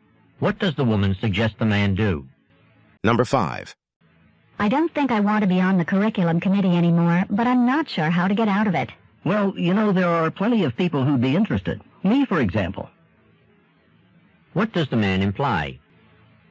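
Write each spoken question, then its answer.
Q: What does the man imply?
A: He would like to replace the woman on the curriculum committee.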